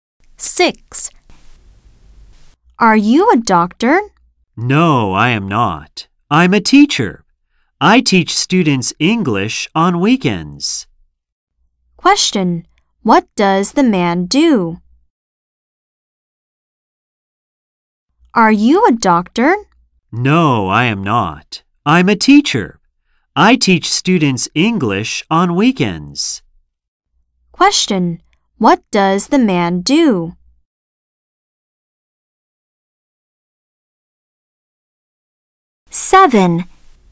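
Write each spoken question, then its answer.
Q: What does the man do?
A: He is a teacher.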